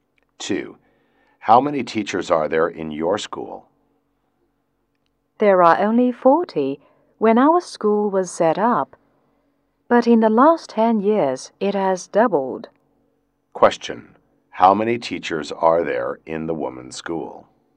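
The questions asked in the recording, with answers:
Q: How many teachers are there in the woman's school?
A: 80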